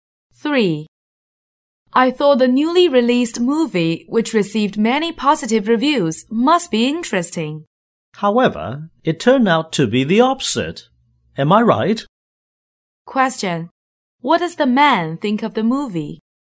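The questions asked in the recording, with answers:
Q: What does the man think of the movie?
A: It was disappointing, not interesting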